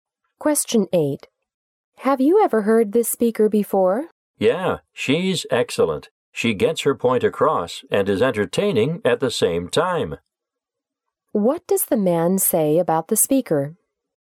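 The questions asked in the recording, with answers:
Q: What does the man say about the speaker?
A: She is excellent: clear and entertaining at the same time.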